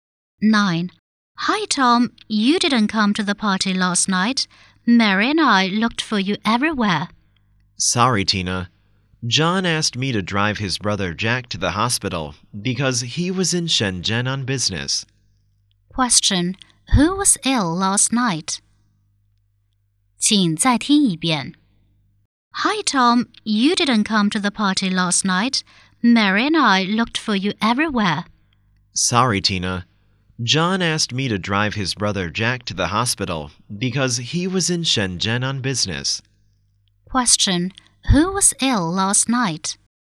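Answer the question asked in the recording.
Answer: Jack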